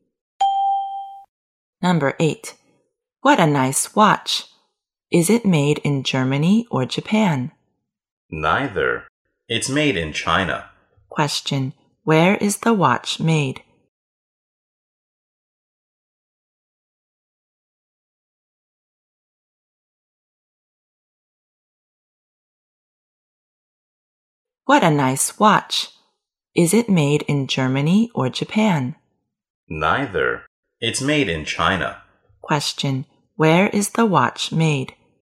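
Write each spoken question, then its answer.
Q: Where is the watch made?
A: In China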